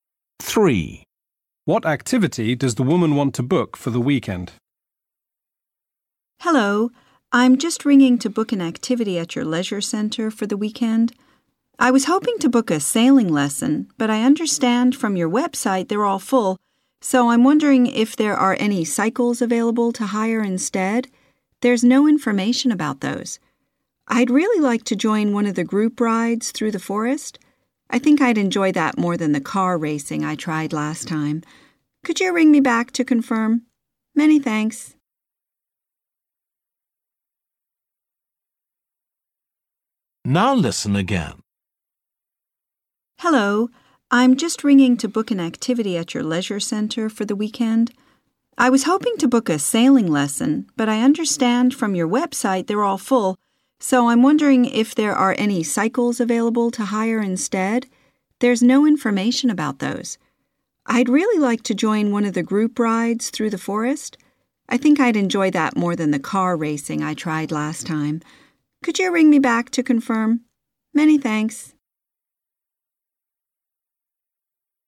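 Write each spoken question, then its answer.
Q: What activity does the woman want to book for the weekend?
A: cycling (a group bike ride through the forest)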